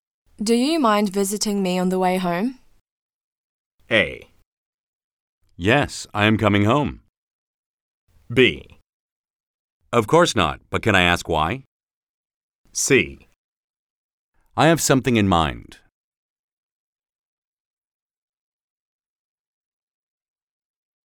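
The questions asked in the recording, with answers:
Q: Do you mind visiting me on the way home?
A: B: Of course not, but can I ask why?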